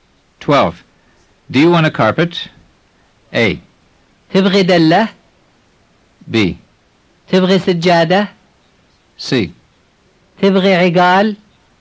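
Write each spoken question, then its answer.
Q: Do you want a carpet?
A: B: تبغي سجادة؟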